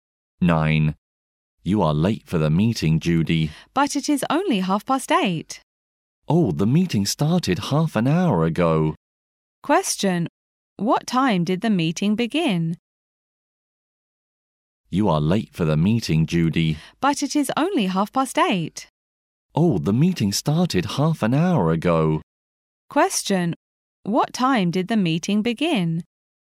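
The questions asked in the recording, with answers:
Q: What time did the meeting begin?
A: At 8:00.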